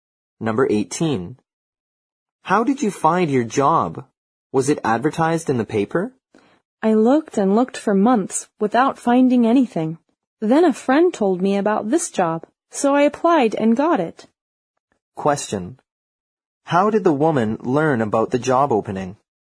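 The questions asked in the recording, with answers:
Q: How did the woman learn about the job opening?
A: From a friend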